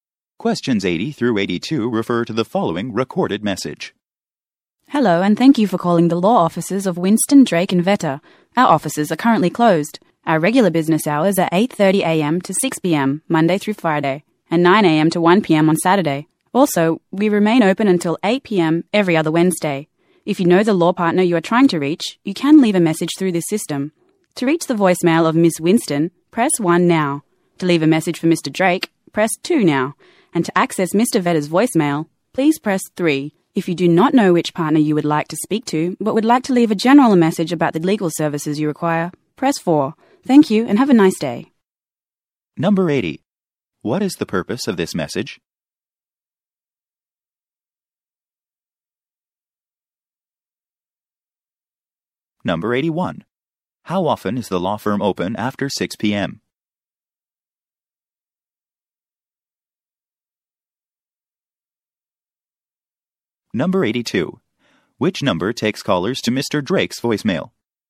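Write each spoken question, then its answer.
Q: What is the purpose of this message?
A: To give office hours and voicemail options while the office is closed

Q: How often is the law firm open after 6 p.m.?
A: Every other Wednesday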